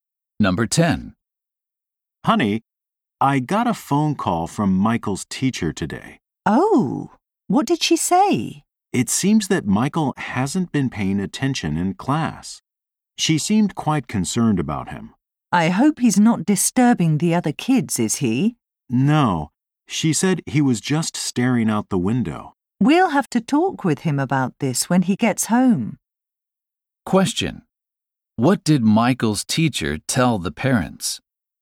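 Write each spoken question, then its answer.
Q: What did Michael's teacher tell the parents?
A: Michael hasn't been paying attention in class and stares out the window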